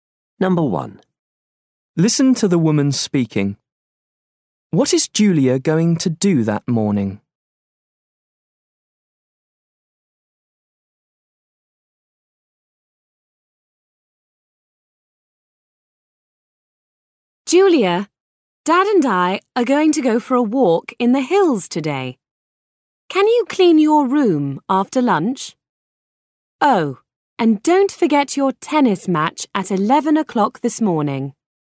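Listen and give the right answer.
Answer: Play in a tennis match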